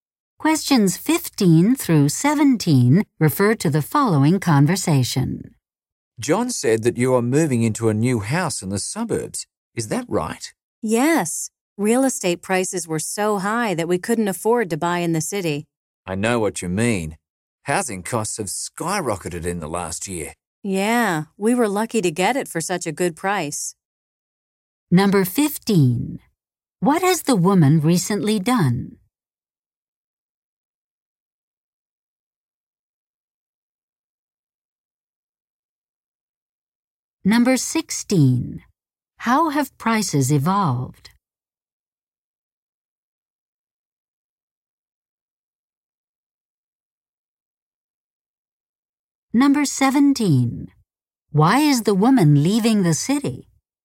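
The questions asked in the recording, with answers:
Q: What has the woman recently done?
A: Bought a new house in the suburbs

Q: How have prices evolved?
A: Housing costs have skyrocketed

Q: Why is the woman leaving the city?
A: Real estate prices in the city were too high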